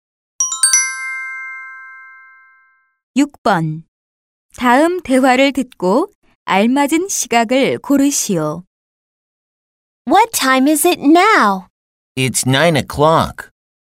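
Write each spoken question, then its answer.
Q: 다음 대화를 듣고 알맞은 시각을 고르시오.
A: 9시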